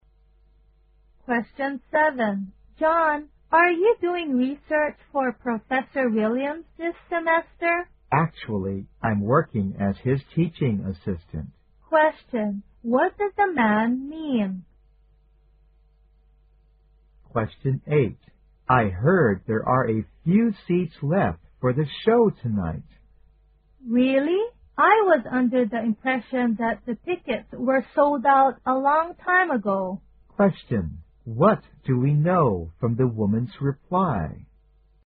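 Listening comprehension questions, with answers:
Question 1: What does the man mean?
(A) He needs another job as research assistant.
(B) He asked Professor Williams for assistance.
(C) He assists Professor Williams with his teaching.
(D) He is doing research with Professor Williams.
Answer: (C) He assists Professor Williams with his teaching.

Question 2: What do we know from the woman's reply?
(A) She thought there were no tickets left for the show.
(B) She thought the seats on the left side were fully occupied.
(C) The show was planned a long time ago.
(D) The audience were deeply impressed by the show.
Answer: (A) She thought there were no tickets left for the show.

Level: 四级

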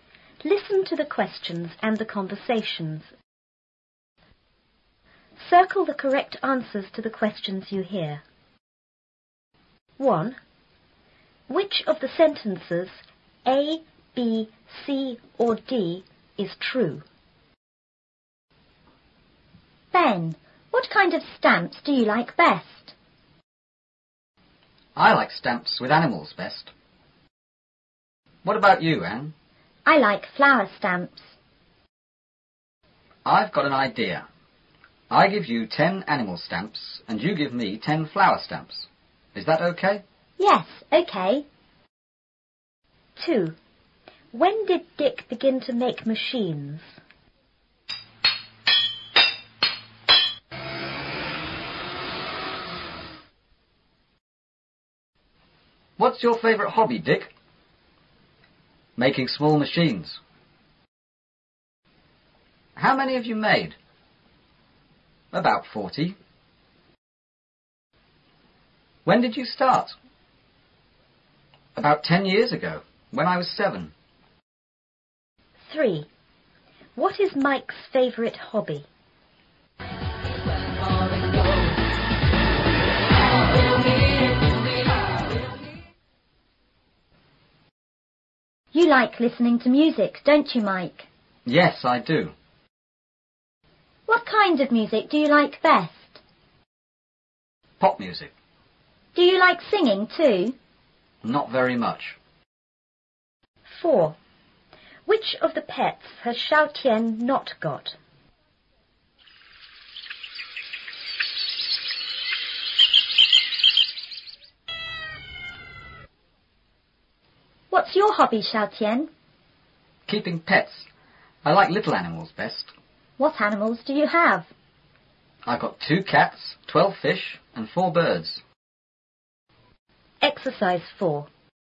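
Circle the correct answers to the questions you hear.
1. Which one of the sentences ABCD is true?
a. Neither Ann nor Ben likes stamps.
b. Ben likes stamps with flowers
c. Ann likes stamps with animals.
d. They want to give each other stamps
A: d. They want to give each other stamps

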